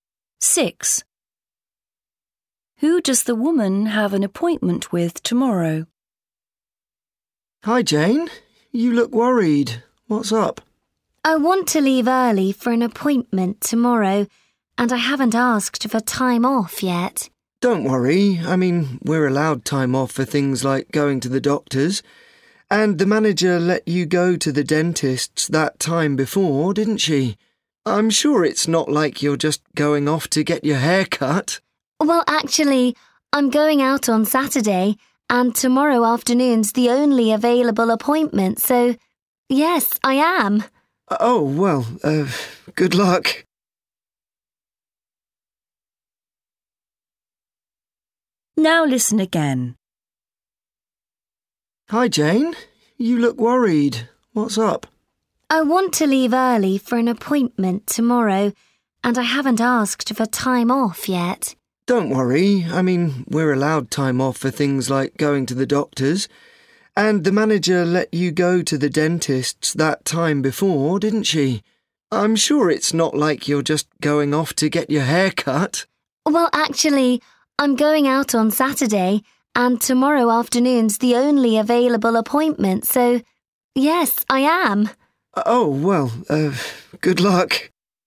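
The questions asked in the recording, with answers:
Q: Who does the woman have an appointment with tomorrow?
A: A hairdresser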